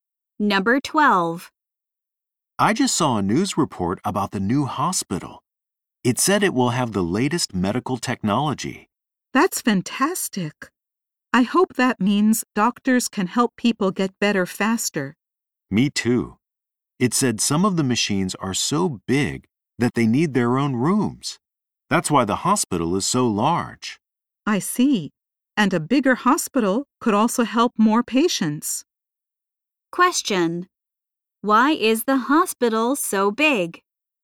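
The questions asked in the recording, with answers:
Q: Why is the hospital so big?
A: Some machines are so big they need their own rooms.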